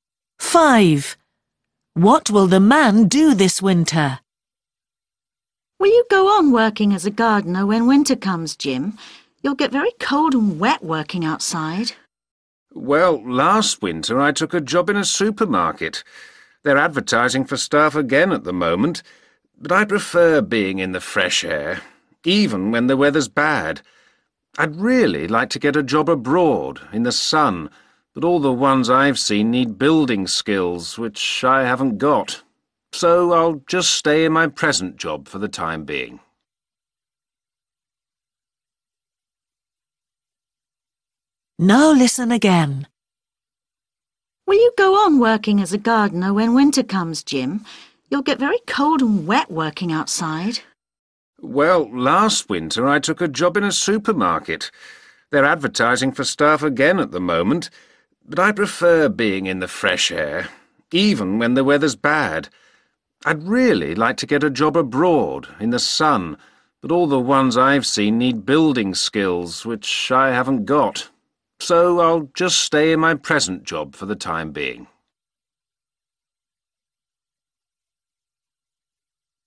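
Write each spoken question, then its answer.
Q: What will the man do this winter?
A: keep working as a gardener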